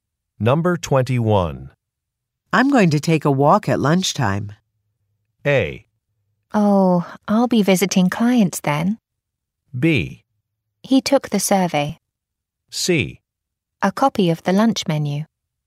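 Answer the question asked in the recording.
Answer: A: Oh, I'll be visiting clients then.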